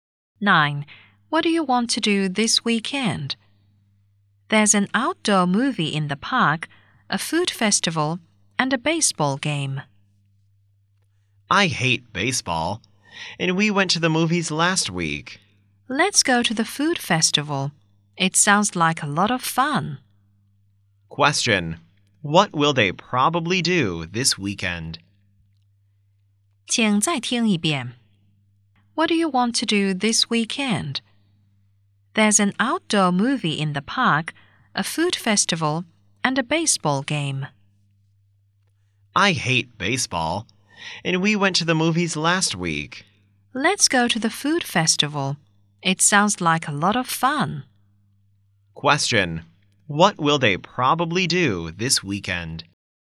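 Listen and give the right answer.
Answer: Go to the food festival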